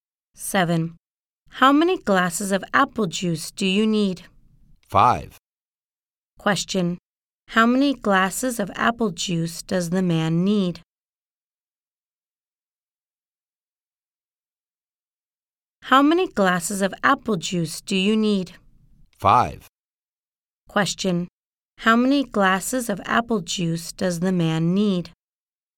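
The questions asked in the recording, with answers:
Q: Question, how many glasses of apple juice does the man need?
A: Five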